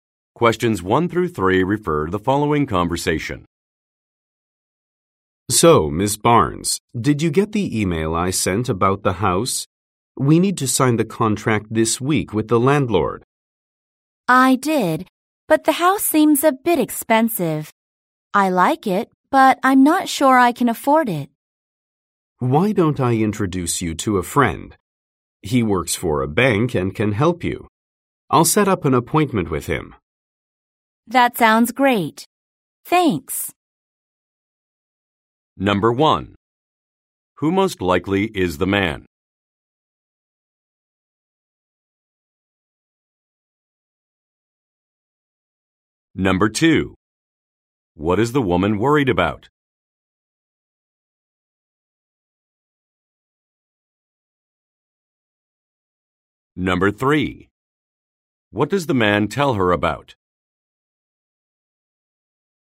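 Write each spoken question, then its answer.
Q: What is the woman worried about?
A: The house is too expensive

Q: What does the man tell her about?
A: A friend who works for a bank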